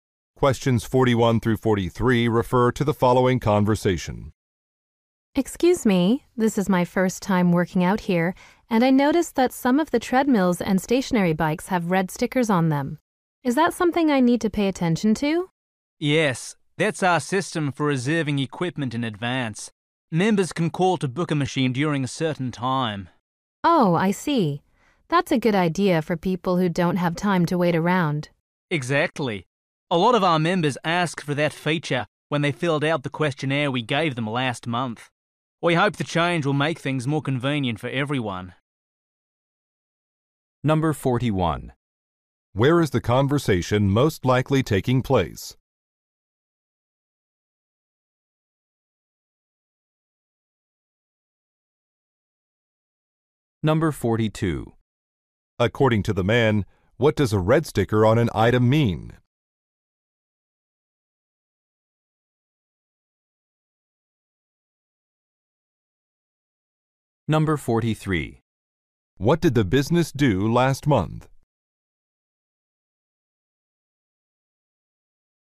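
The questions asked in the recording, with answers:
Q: Where is the conversation most likely taking place?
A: At a gym

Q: According to the man, what does a red sticker on an item mean?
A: The machine has been reserved

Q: What did the business do last month?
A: Gave members a questionnaire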